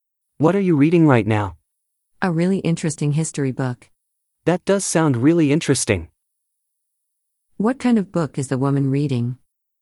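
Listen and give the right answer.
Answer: a history book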